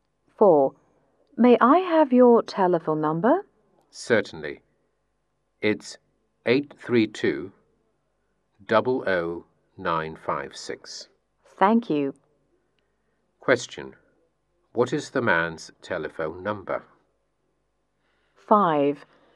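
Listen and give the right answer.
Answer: 832-00956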